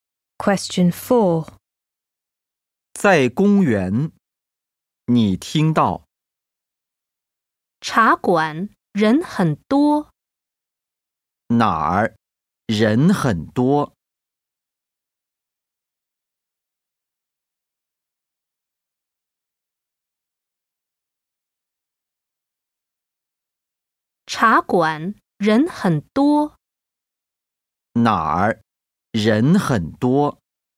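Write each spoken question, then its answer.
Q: 哪儿人很多?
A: 茶馆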